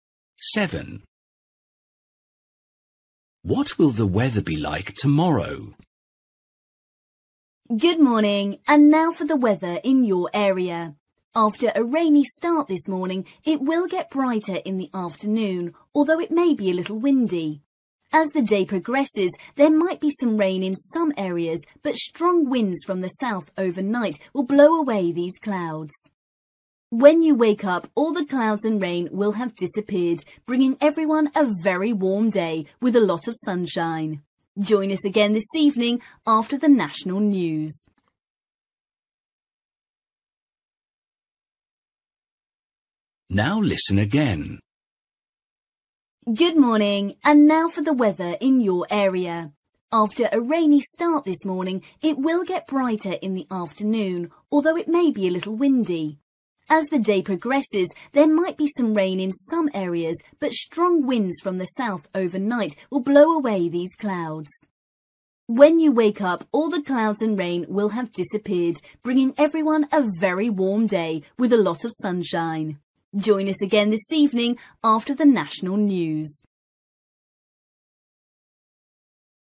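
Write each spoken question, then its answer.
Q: What will the weather be like tomorrow?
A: Warm and sunny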